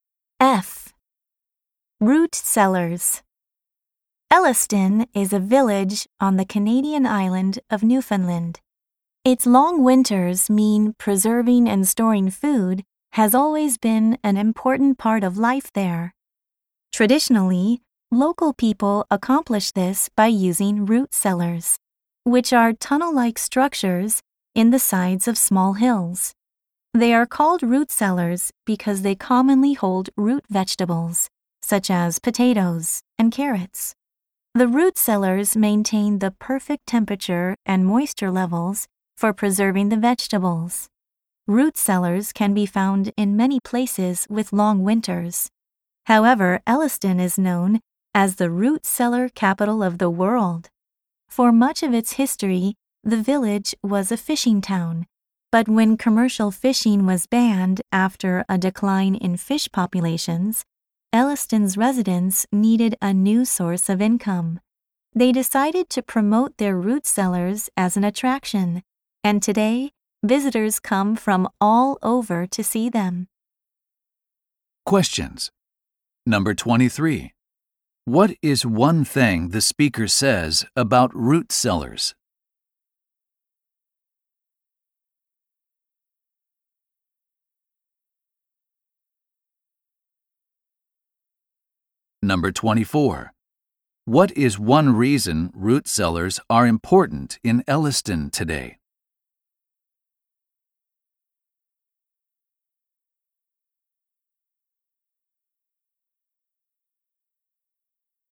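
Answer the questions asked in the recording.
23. They keep the right temperature and moisture to preserve vegetables
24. They attract tourists and provide income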